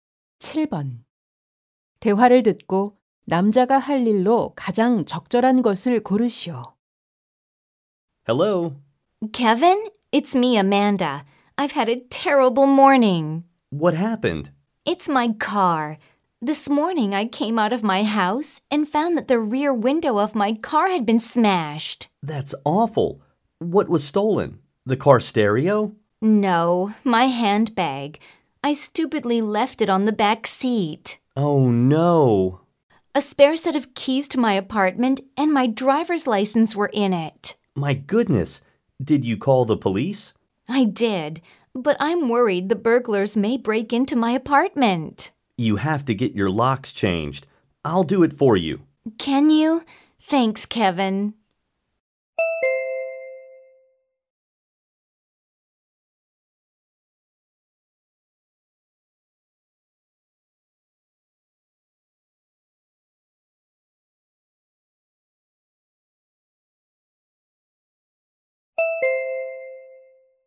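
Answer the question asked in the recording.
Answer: 여자 집의 자물쇠 교체하기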